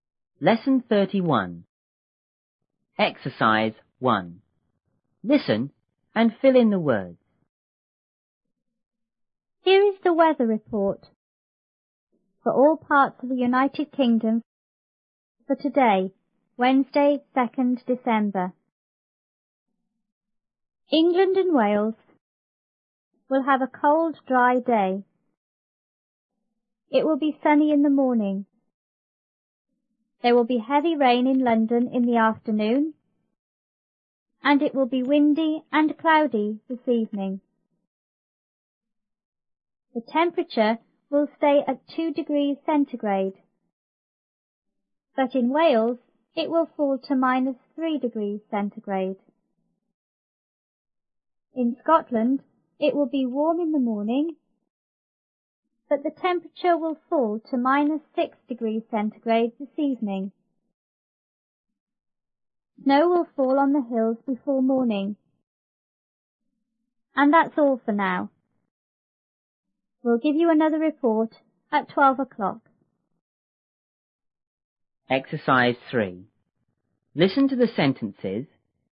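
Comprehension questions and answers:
1.Listen and fill in the words.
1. Here is the ______ ______for all parts of the United Kingdom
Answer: weather report

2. England and Wales will have a ______ ,______ day.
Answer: cold; dry

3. It will be ______ in the morning.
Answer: sunny

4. There will be____ ____in London in the afternoon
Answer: heavy rain

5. and it will be _____ and _____this evening.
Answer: windy; cloudy

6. The _____ will ______ at 2°C,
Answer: temperature; stay

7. but in Wales it will ______to -3°C.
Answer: fall

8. In Scotland it will be ____ in the morning,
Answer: warm

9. but the temperature will ____ to -6°C this evening.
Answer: fall

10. Snow will fall on the ____ before morning.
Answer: hills

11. And that's______for now.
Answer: all

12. We'll ______ you another report at twelve o'clock.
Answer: give

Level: 六年级下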